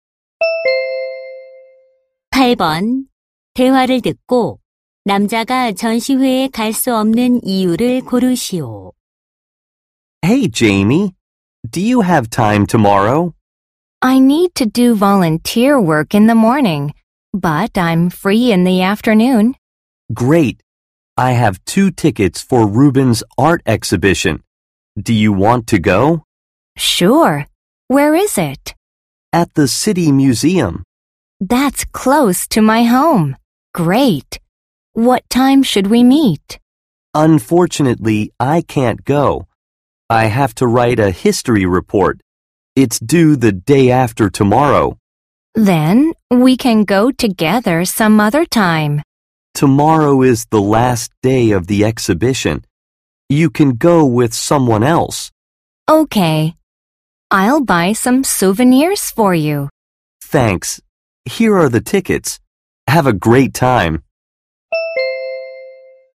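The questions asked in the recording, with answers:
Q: 대화를 듣고 남자가 전시회에 갈 수 없는 이유를 고르시오.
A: 역사 보고서를 써야 해서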